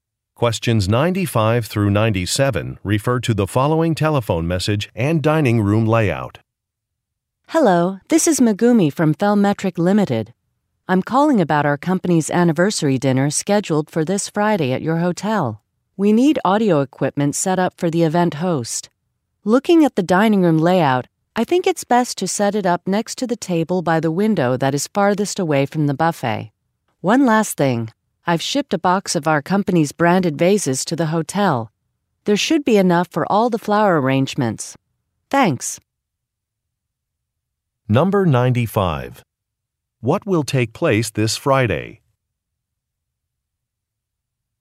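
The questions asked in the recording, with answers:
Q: What will take place this Friday?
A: A company anniversary dinner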